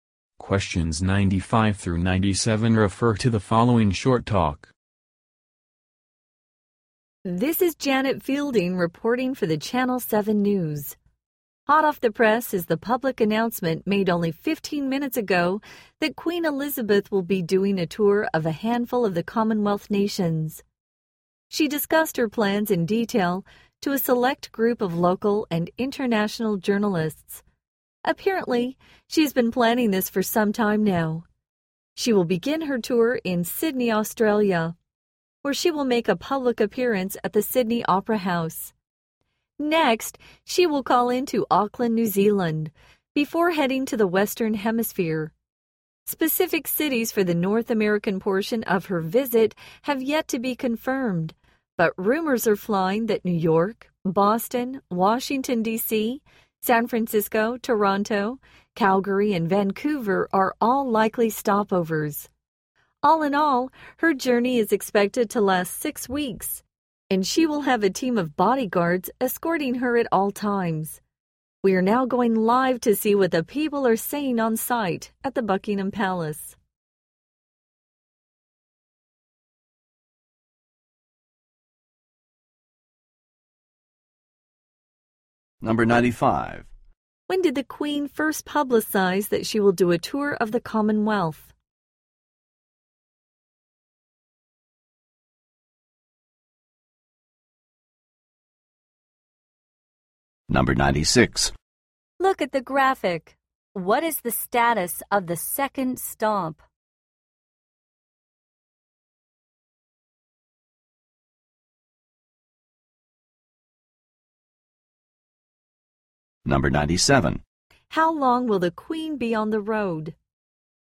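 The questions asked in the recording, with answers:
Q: When did the Queen first publicize that she will do a tour of the Commonwealth?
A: 15 minutes ago

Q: How long will the Queen be on the road?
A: 6 weeks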